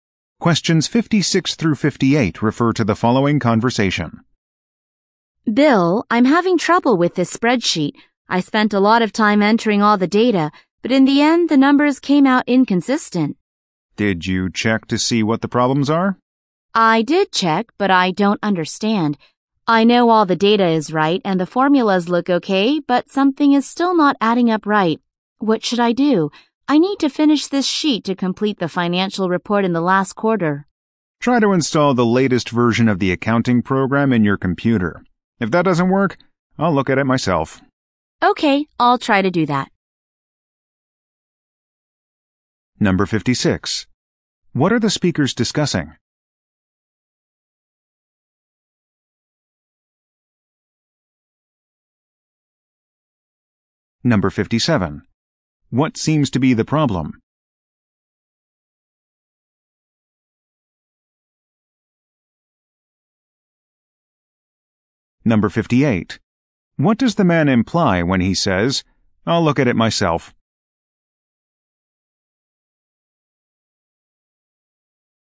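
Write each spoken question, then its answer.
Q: What are the speakers discussing?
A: A spreadsheet for a financial report

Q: What seems to be the problem?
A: The numbers came out inconsistent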